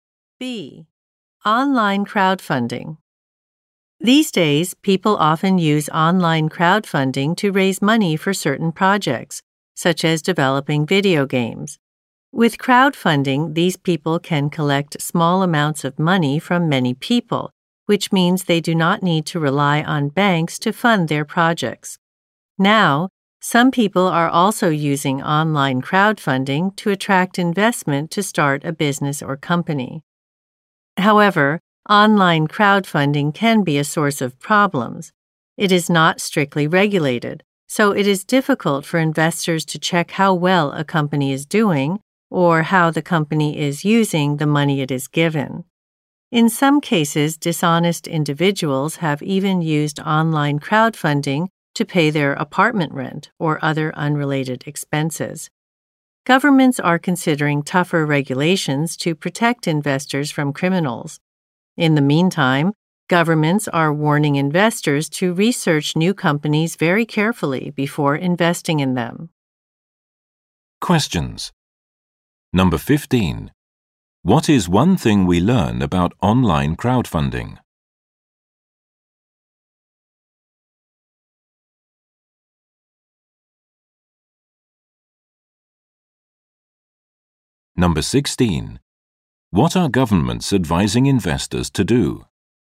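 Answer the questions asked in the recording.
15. It is not strictly regulated, so it is hard for investors to check how the money is used.
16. Research new companies very carefully before investing in them.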